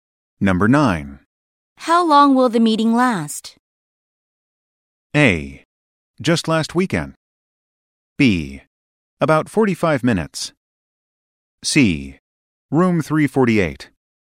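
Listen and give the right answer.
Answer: B: About 45 minutes.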